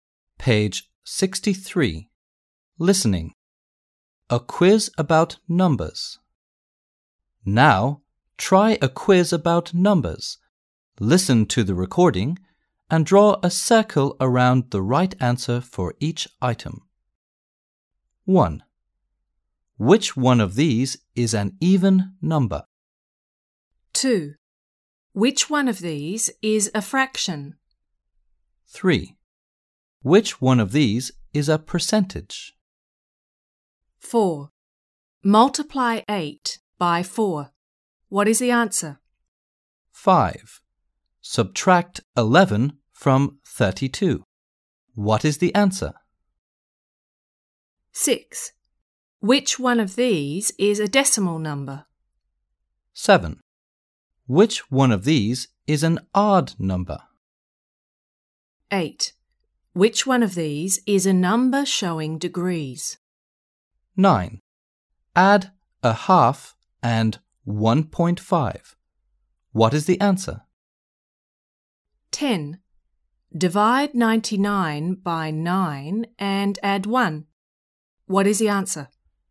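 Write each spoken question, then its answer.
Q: Multiply 8 by 4. What is the answer?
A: 32

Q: Subtract 11 from 32. What is the answer?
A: 21

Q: Divide 99 by 9 and add 1.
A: 12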